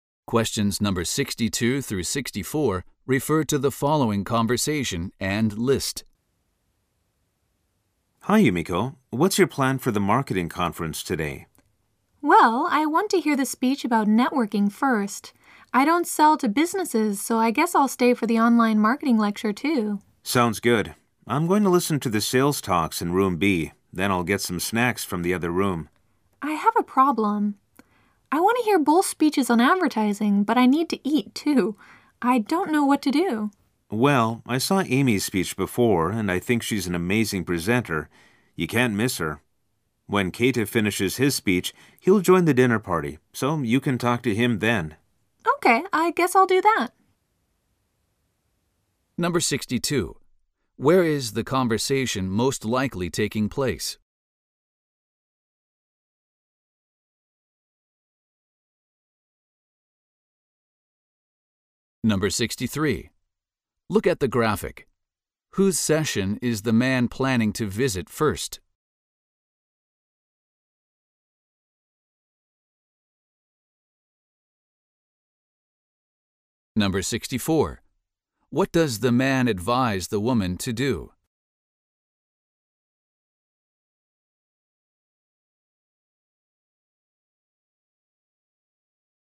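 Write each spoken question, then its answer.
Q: Where is the conversation most likely taking place?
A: At a marketing conference

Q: What does the man advise the woman to do?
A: Go to Amy's speech and talk to Keita at the dinner party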